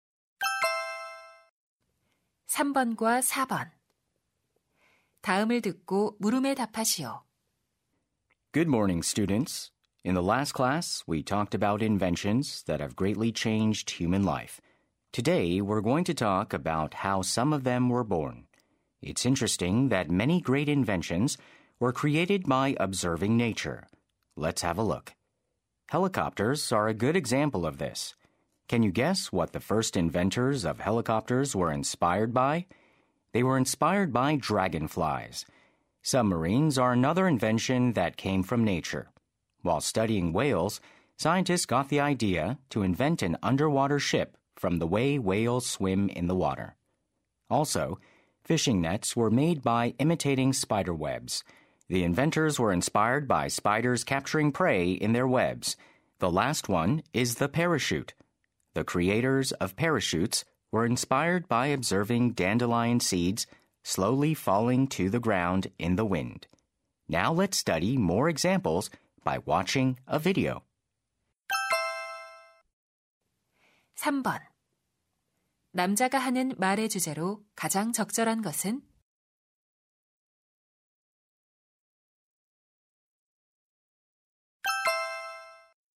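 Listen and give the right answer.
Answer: 자연을 관찰하여 만들어진 발명품들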